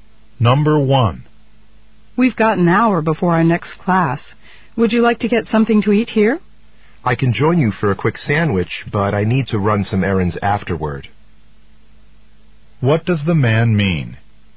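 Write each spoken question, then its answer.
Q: What does the man mean?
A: He can eat only briefly because he has errands afterward.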